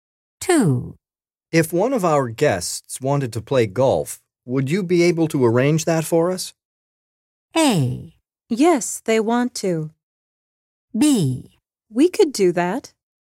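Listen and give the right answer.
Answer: B: We could do that.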